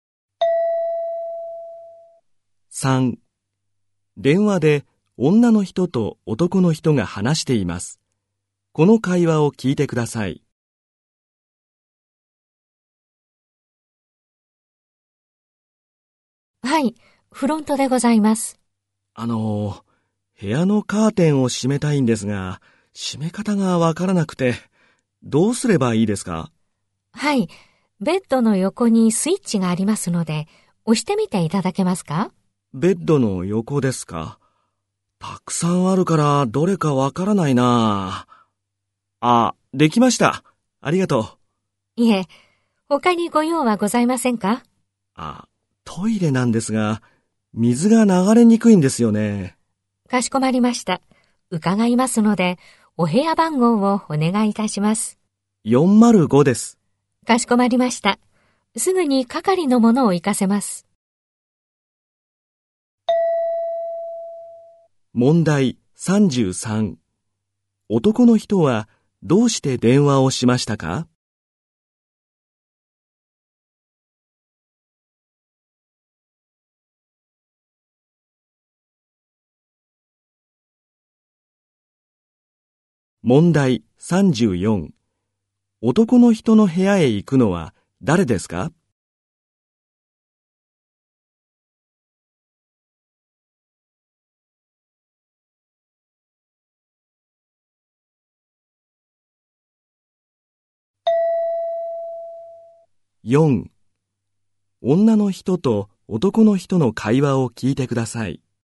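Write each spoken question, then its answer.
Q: 男の人の部屋へ行くのは誰ですか?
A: 係の者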